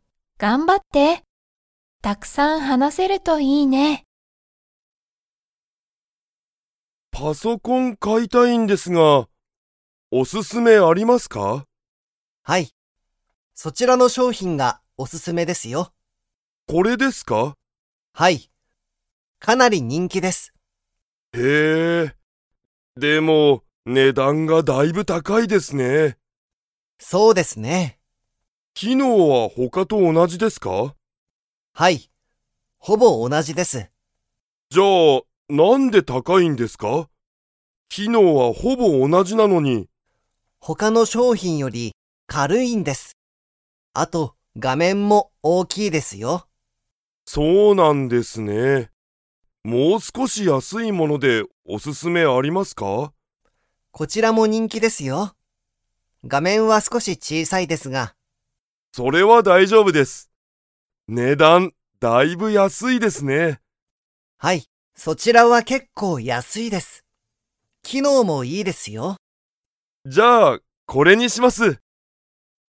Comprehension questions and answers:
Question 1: 最初さいしょにお勧すすめした商品しょうひんは、機能きのうが他ほかとほぼ同おなじですか?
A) はい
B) いいえ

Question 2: 佐藤さとうさんは、 が少すこし小ちいさいパソコンにする。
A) 機能きのう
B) お勧すすめ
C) 画面がめん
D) 人気にんき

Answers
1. A) はい
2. C) 画面がめん

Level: Level 4

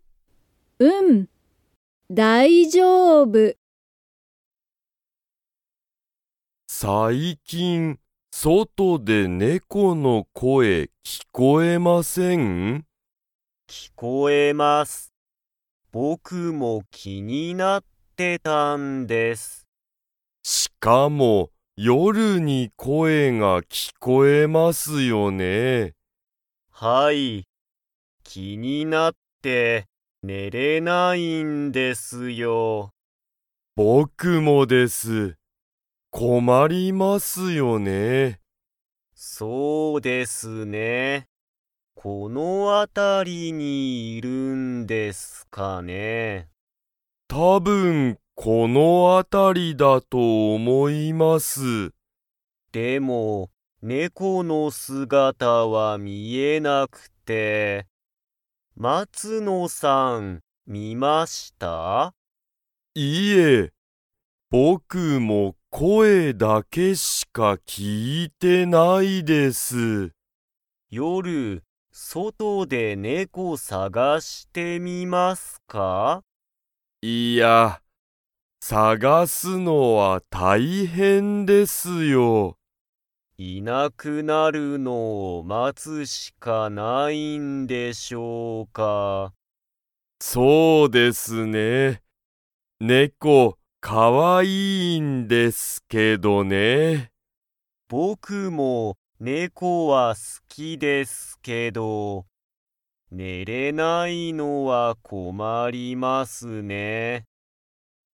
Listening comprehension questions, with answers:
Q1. 最近さいきん、外そとで の声こえが聞きこえる。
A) 猫ねこ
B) 犬いぬ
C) 子供こども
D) 大人おとな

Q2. 竹田たけださんはよく寝ねれていますか?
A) はい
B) いいえ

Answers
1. A) 猫ねこ
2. B) いいえ

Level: Level 3

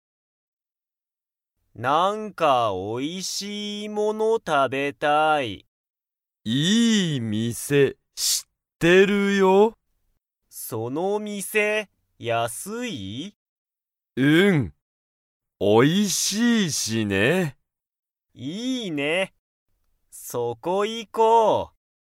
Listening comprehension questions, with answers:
そうたは____物(もの)を食(た)べたい。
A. かわいい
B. 高(たか)い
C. おいしい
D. きれいな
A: C. おいしい

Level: Level 1

